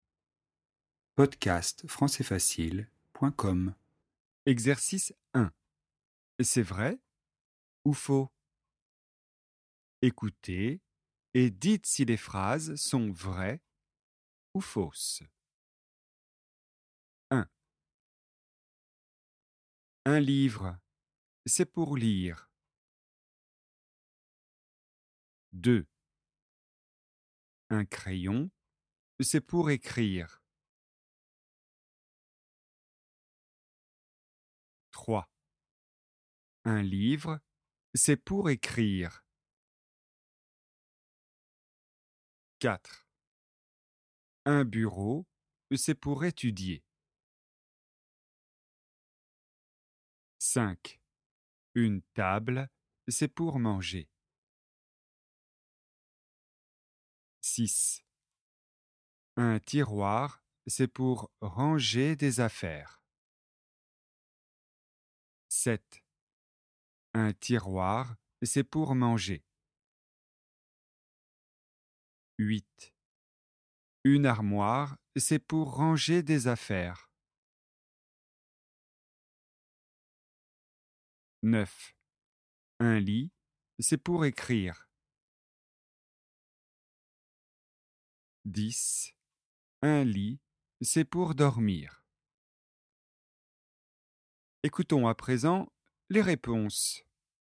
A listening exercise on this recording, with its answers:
📌 Écoutez et dites si les phrases son vraies ou fausses :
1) Un livre, c'est pour lire.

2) Un crayon, c'est pour écrire.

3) Un livre, c'est pour écrire.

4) Un bureau, c'est pour étudier.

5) Une table, c'est pour manger.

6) Un tiroir, c'est pour ranger des affaires.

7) Un tiroir, c'est pour manger.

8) Une armoire, c'est pour ranger des affaires.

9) Un lit, c'est pour écrire.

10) Un lit, c'est pour dormir.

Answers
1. C'est vrai.
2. C'est vrai.
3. C'est faux.
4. C'est vrai.
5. C'est vrai.
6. C'est vrai.
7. C'est faux.
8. C'est vrai.
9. C'est faux.
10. C'est vrai.

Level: niveau débutant